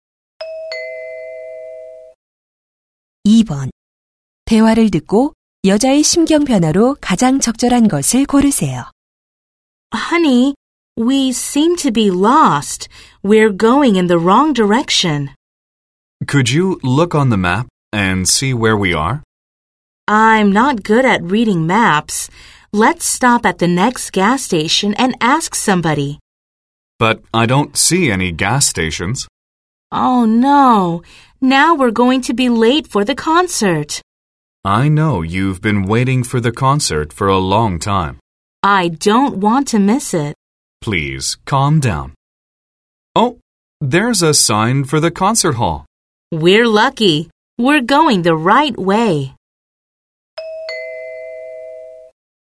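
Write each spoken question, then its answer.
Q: 대화를 듣고 여자의 심경 변화로 가장 적절한 것을 고르세요.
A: 걱정스러움에서 안도감으로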